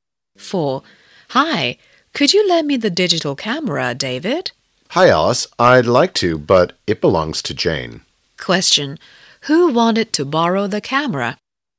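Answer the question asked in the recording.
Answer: Alice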